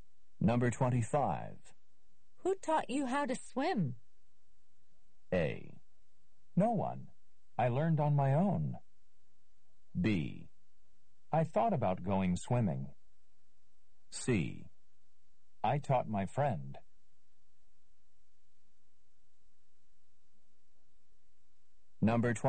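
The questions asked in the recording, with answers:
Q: Who taught you how to swim?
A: A: No one. I learned on my own.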